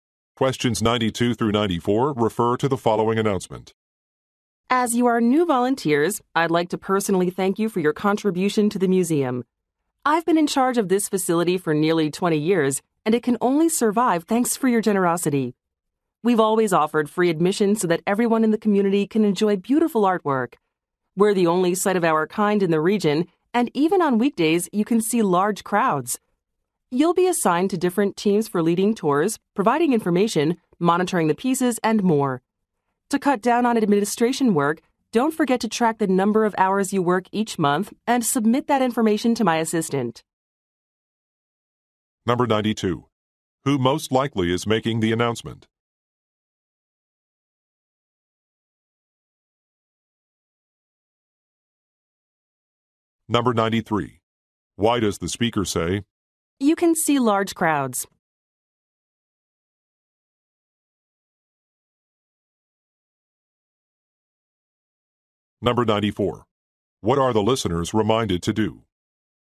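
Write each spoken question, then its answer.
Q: Who most likely is making the announcement?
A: A museum director

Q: What are the listeners reminded to do?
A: Track and submit their monthly work hours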